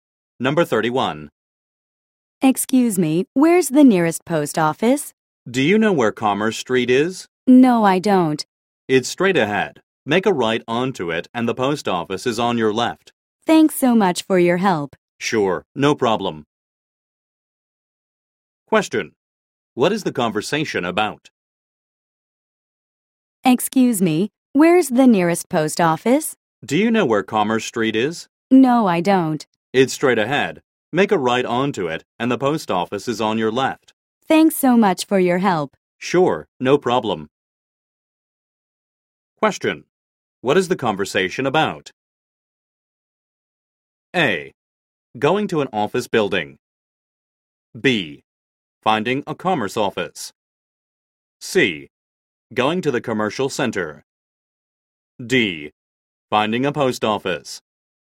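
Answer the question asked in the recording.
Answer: D: Finding a post office.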